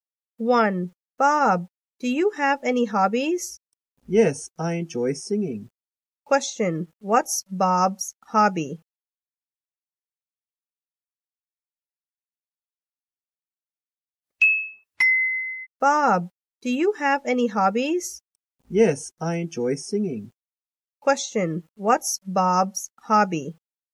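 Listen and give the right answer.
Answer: Singing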